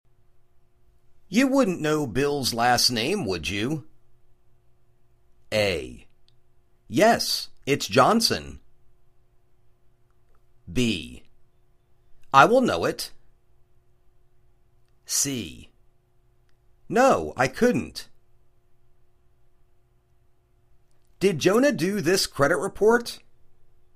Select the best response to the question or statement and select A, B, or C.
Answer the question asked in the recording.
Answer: Yes, it's Johnson.